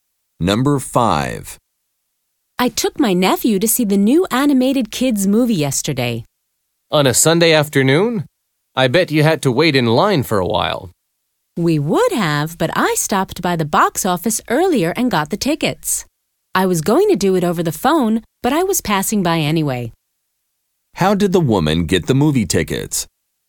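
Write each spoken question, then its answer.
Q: How did the woman get the movie tickets?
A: At the box office in advance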